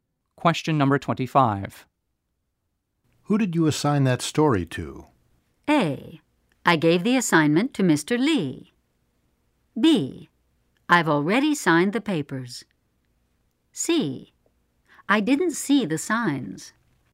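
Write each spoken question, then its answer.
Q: Who did you assign that story to?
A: A: I gave the assignment to Mr. Lee.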